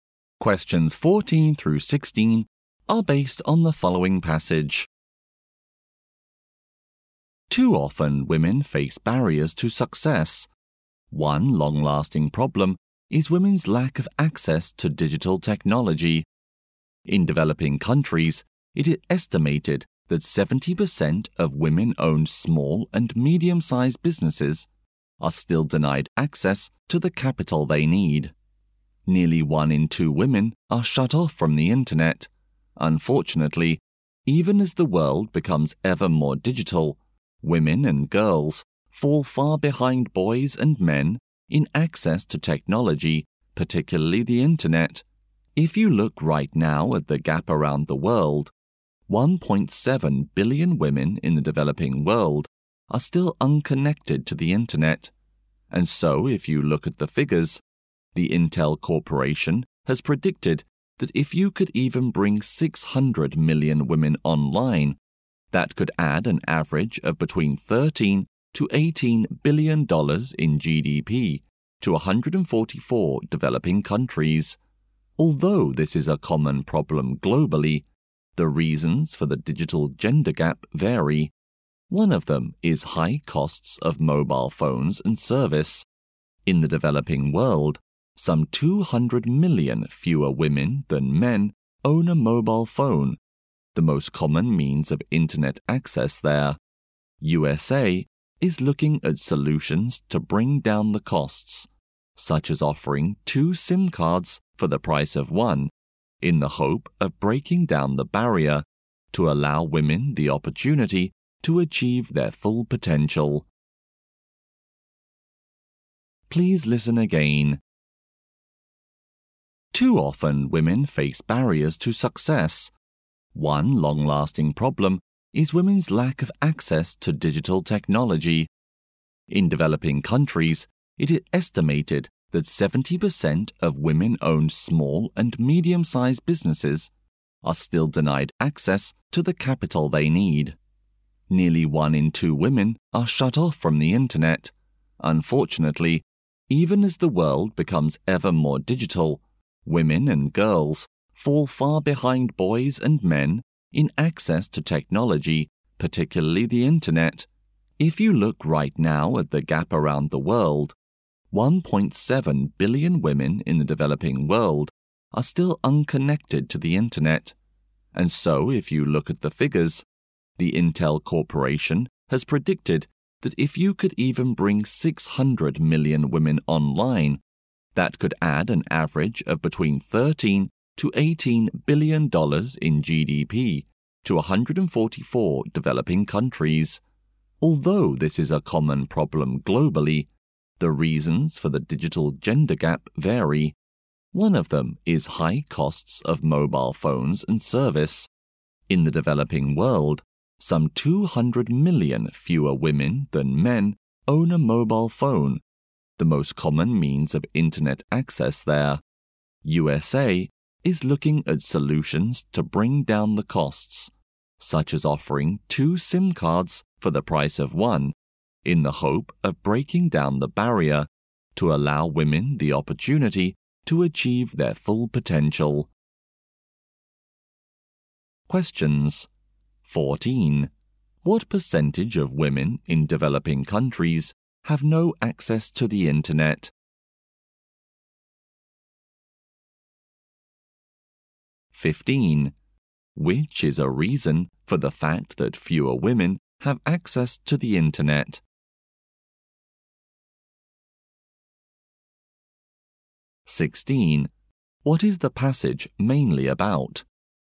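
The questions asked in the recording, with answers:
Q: What percentage of women in developing countries have no access to the internet?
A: About 50%

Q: Which is a reason for the fact that fewer women have access to the internet?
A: High costs of mobile phones and service

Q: What is the passage mainly about?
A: Women's lack of access to digital technology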